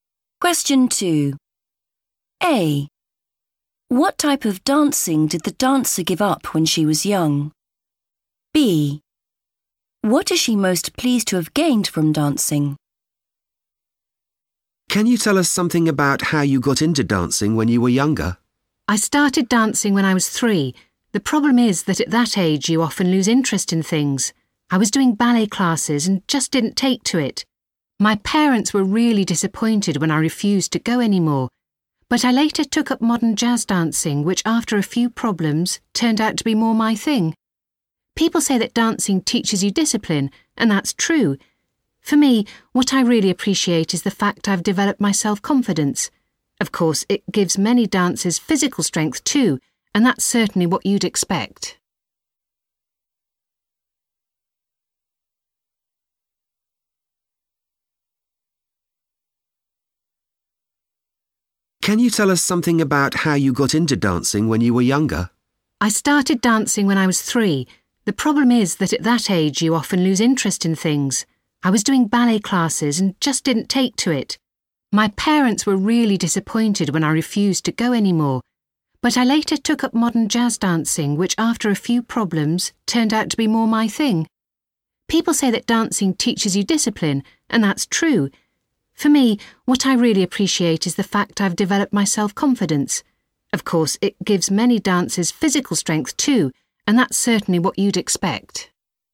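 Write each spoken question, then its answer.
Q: What type of dancing did the dancer give up when she was young?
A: ballet

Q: What is she most pleased to have gained from dancing?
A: self-confidence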